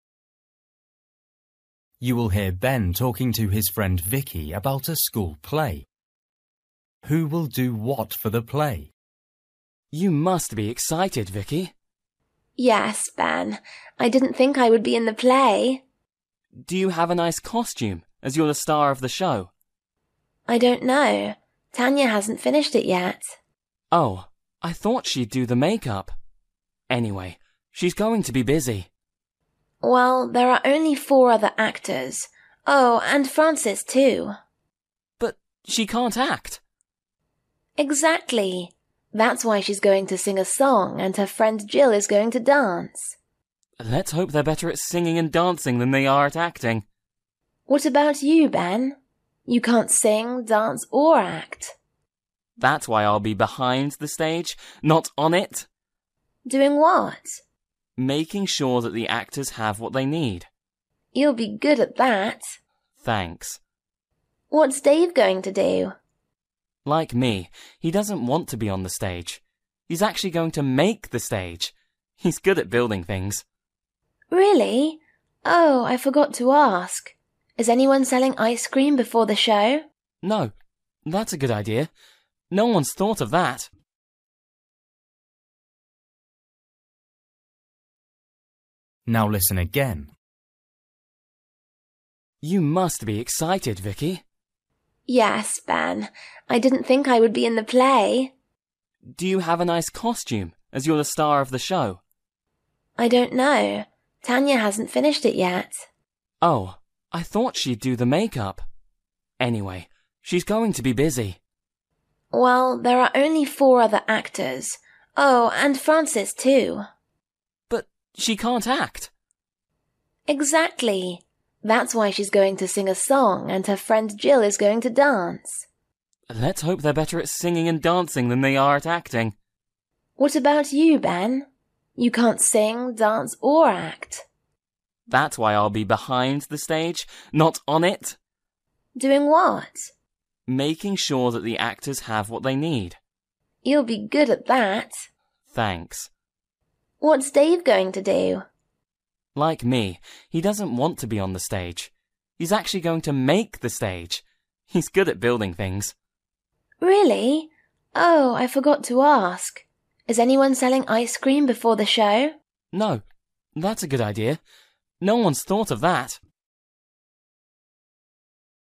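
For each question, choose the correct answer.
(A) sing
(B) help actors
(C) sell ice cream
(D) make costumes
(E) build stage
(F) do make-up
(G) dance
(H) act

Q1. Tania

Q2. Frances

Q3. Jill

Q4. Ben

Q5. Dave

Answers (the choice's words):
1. make costumes
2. sing
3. dance
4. help actors
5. build stage

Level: Luyện nghe trình độ A2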